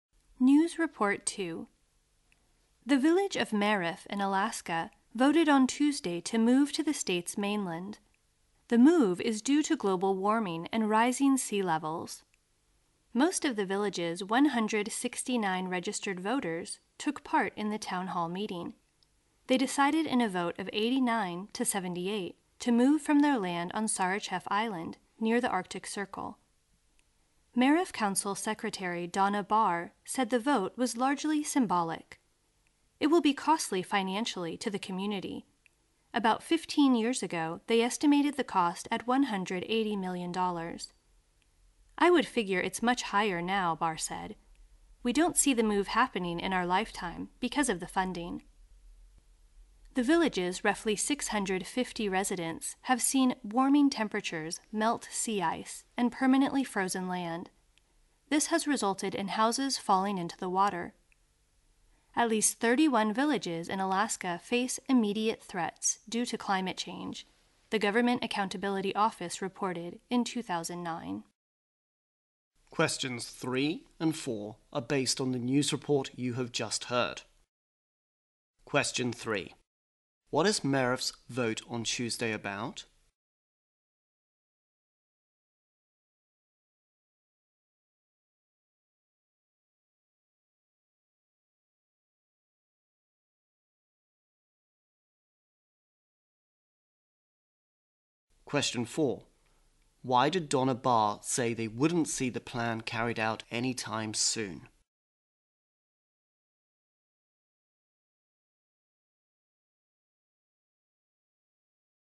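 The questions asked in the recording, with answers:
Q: What is Merif's vote on Tuesday about?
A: Moving the village to the mainland

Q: Why did Donna Barr say they wouldn't see the plan carried out anytime soon?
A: Because of the funding; the move is very costly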